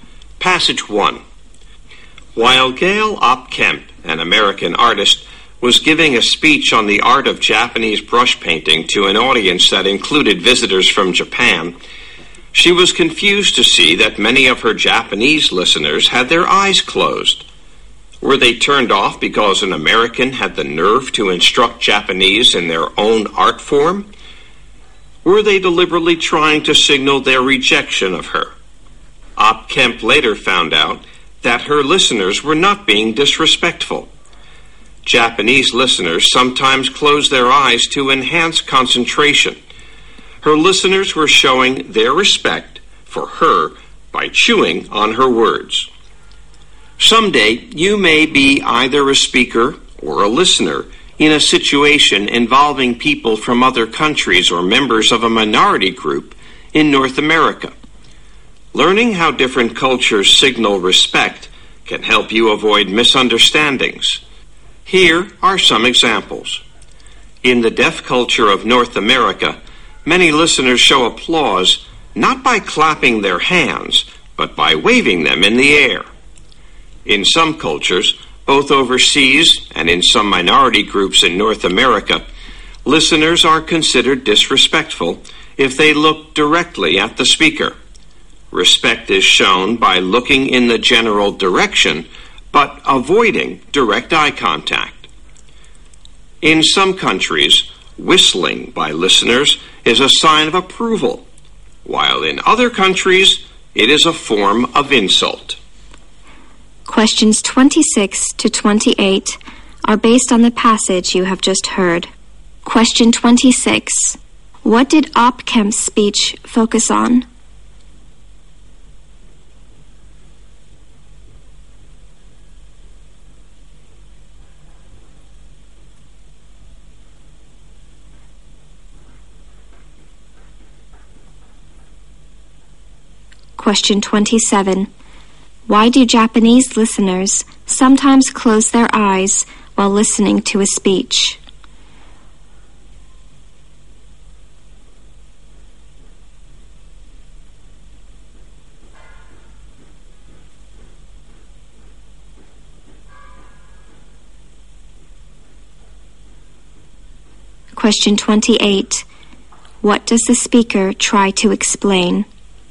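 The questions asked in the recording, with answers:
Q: What did Opkamp's speech focus on?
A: The art of Japanese brush painting

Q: Why do Japanese listeners sometimes close their eyes while listening to a speech?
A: To concentrate better

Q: What does the speaker try to explain?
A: How different cultures show respect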